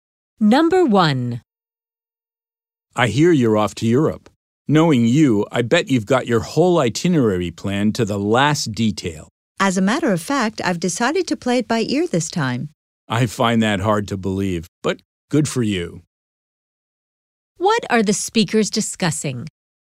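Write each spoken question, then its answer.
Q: What are the speakers discussing?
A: The woman's trip to Europe, which she hasn't planned in detail this time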